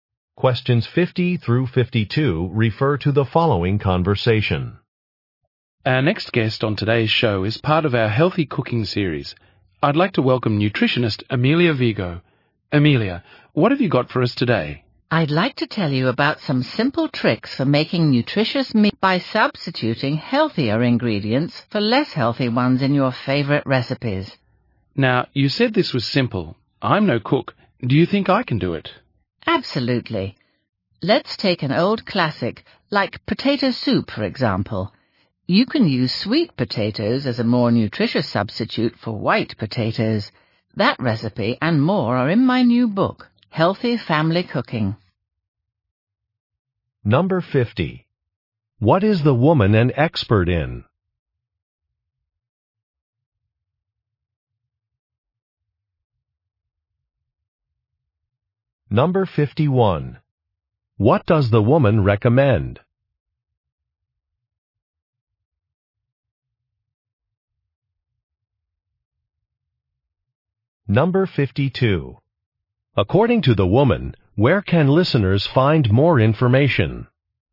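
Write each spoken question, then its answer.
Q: What is the woman an expert in?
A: Nutrition

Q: What does the woman recommend?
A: Substituting healthier ingredients, such as sweet potatoes

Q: According to the woman, where can listeners find more information?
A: In her new book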